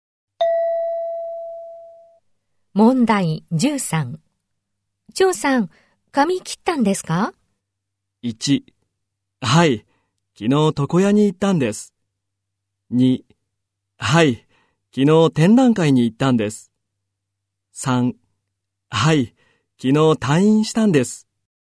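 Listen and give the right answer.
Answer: 1: はい、昨日床屋に行ったんです。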